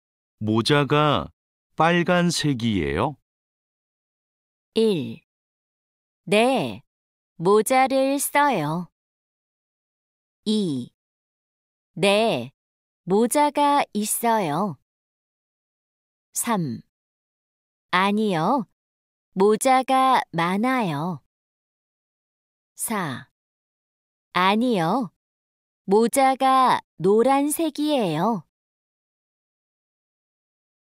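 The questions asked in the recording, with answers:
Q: 모자가 빨간색이에요?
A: 4: 아니요, 모자가 노란색이에요.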